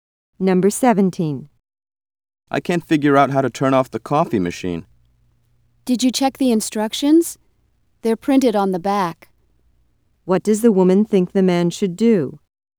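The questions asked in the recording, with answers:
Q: What does the woman think the man should do?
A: Read the instructions on the back of the machine.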